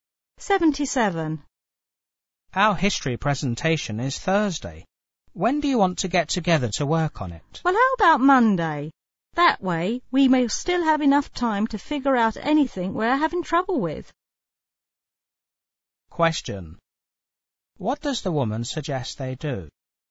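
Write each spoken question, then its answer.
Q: What does the woman suggest they do?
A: Meet on Monday to work on the presentation.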